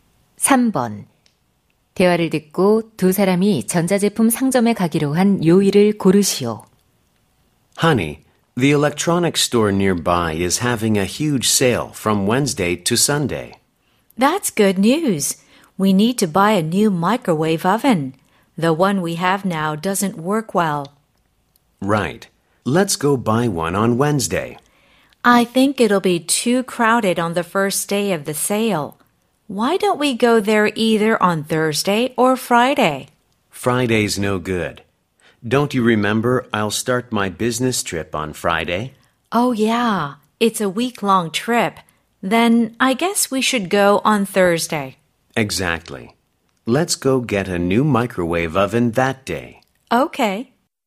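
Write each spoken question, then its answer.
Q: 대화를 듣고 두 사람이 전자제품 상점에 가기로 한 요일을 고르시오.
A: 목요일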